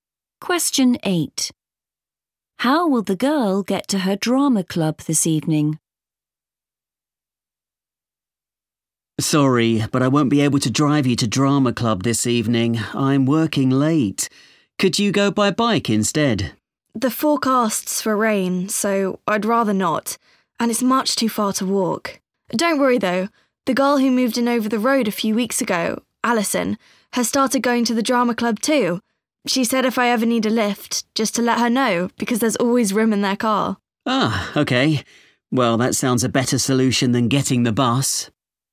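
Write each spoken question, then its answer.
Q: How will the girl get to her drama club this evening?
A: She'll get a lift in Alison's car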